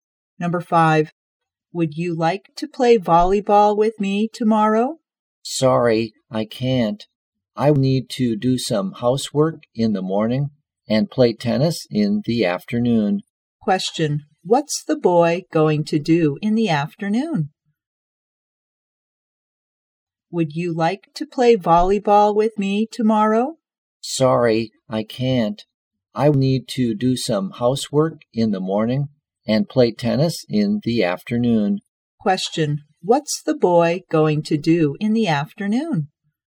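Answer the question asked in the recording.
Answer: Play tennis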